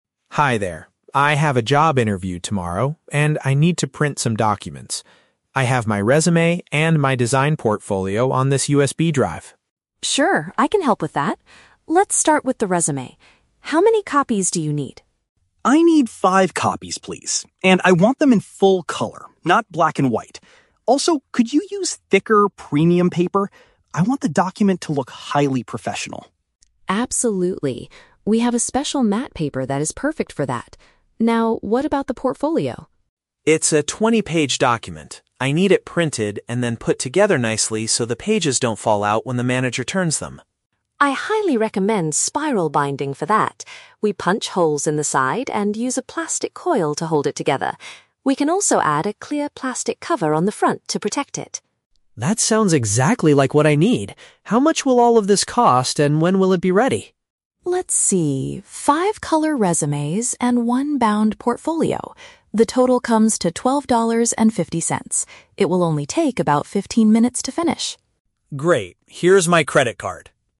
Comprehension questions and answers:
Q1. What specific request does Tom make for his resumes?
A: He wants them printed in color on heavy, high-quality paper.

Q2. How does Maria suggest preparing the 20-page portfolio?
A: By securing the edges and adding a see-through cover.

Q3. How long does Tom have to wait to get his printed documents?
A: Less than half an hour.

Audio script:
Tom: Hi there. I have a job interview tomorrow, and I need to print some documents. I have my resume and my design portfolio on this USB drive.
Maria: Sure, I can help with that. Let's start with the resume. How many copies do you need?
Tom: I need five copies, please. And I want them in full color, not black and white. Also, could you use thicker, premium paper? I want the document to look highly professional.
Maria: Absolutely. We have a special matte paper that is perfect for that. Now, what about the portfolio?
Tom: It's a 20-page document. I need it printed and then put together nicely so the pages don't fall out when the manager turns them.
Maria: I highly recommend spiral binding for that. We punch holes in the side and use a plastic coil to hold it together. We can also add a clear plastic cover on the front to protect it.
Tom: That sounds exactly like what I need. How much will all of this cost, and when will it be ready?
Maria: Let's see...